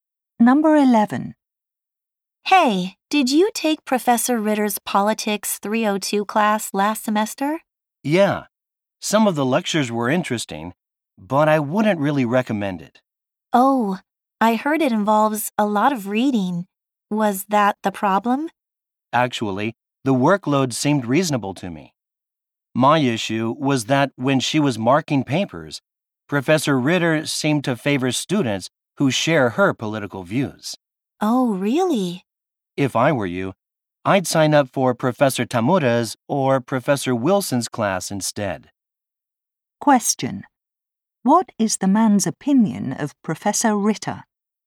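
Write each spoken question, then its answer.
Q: What is the man's opinion of Professor Ritter?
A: She grades unfairly, favoring students who share her political views.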